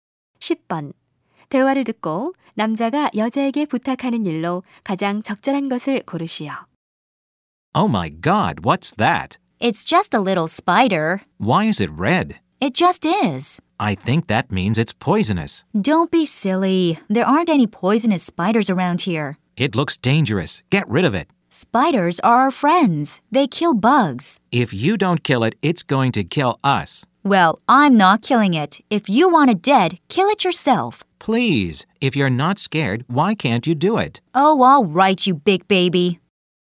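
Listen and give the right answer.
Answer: 거미를 없애 달라고(죽여 달라고) 부탁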